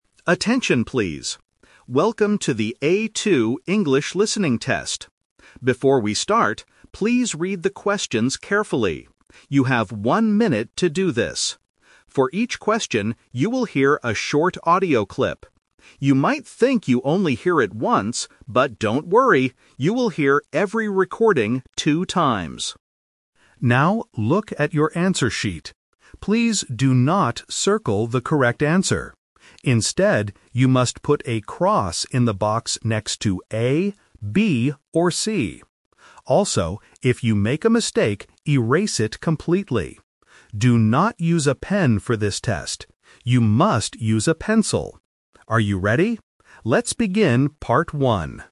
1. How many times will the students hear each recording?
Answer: Two times.

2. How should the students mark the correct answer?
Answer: By putting a cross in the box.

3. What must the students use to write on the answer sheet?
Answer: A pencil.

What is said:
Examiner: Attention, please. Welcome to the A2 English Listening Test. Before we start, please read the questions carefully. You have one minute to do this. For each question, you will hear a short audio clip. You might think you only hear it once, but don't worry, you will hear every recording two times.
Now, look at your answer sheet. Please do not circle the correct answer. Instead, you must put a cross in the box next to A, B, or C. Also, if you make a mistake, erase it completely. Do not use a pen for this test; you must use a pencil. Are you ready? Let's begin Part 1.